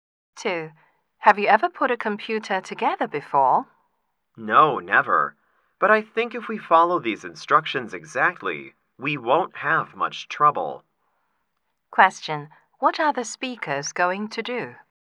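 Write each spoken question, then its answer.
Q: What are the speakers going to do?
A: Put a computer together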